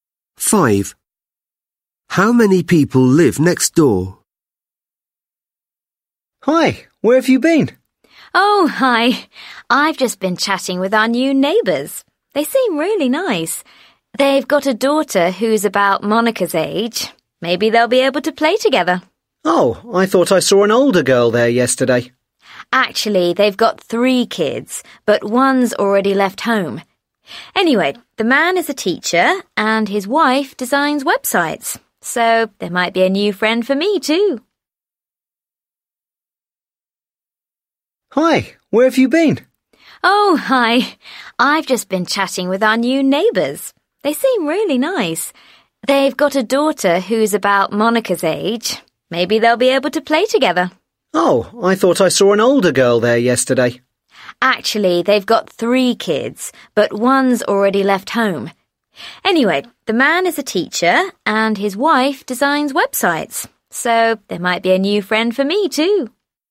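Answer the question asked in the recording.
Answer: Four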